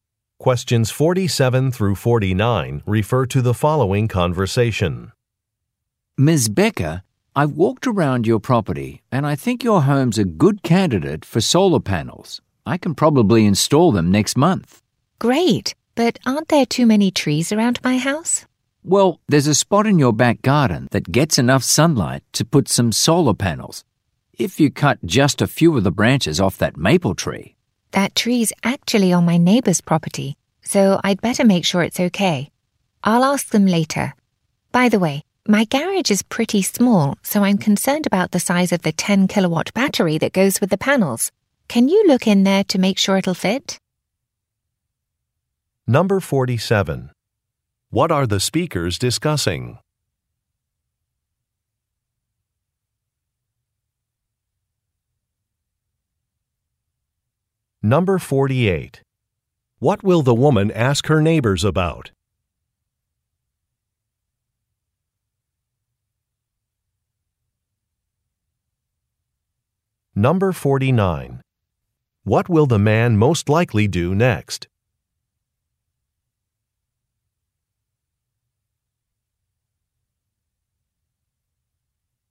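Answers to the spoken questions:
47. Installing solar panels
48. Cutting branches off their maple tree
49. Check the garage to see if the battery will fit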